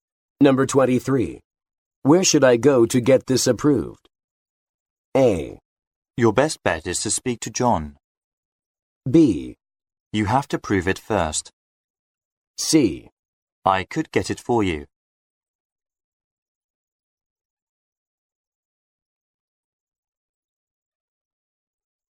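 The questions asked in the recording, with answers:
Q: Where should I go to get this approved?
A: A: Your best bet is to speak to John.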